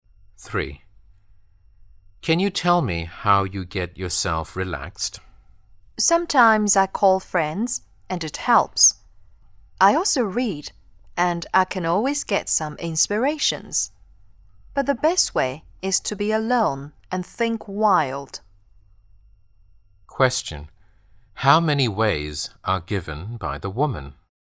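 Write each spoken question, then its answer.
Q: How many ways are given by the woman?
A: Three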